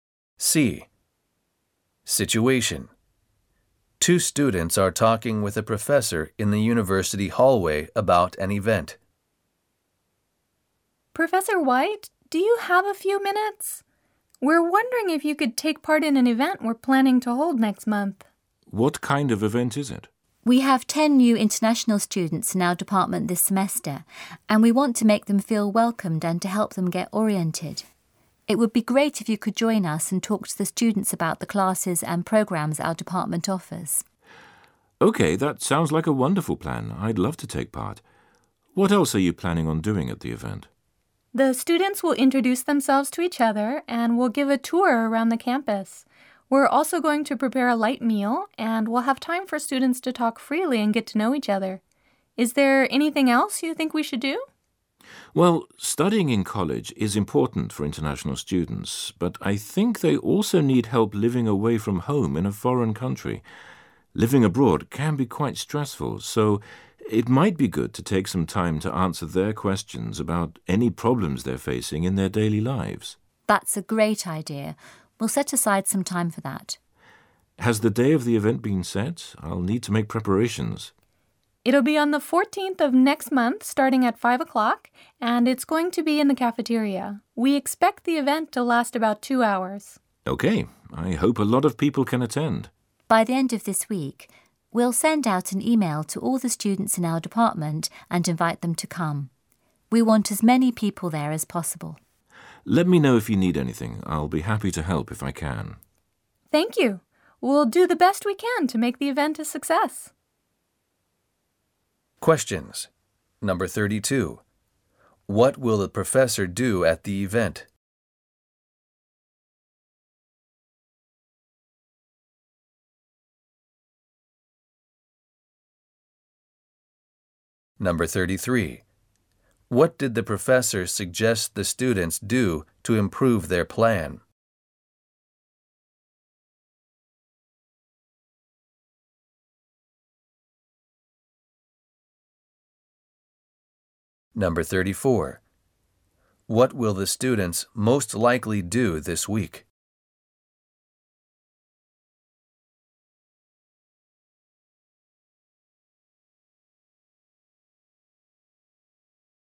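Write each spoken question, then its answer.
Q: What will the professor do at the event?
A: Talk to the students about the department's classes and programs

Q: What did the professor suggest the students do to improve their plan?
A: Take time to answer questions about problems in their daily lives

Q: What will the students most likely do this week?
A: Send an email inviting all students in the department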